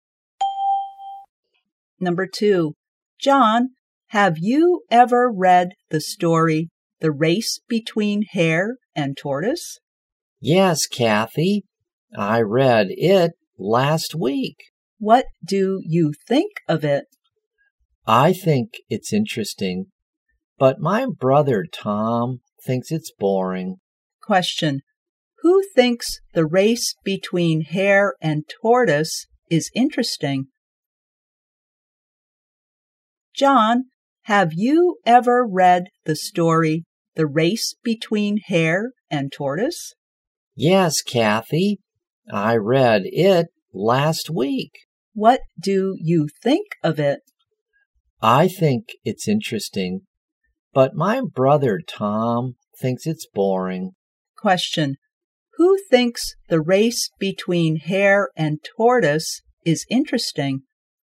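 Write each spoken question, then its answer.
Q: Question, who thinks the race between hare and tortoise is interesting?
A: John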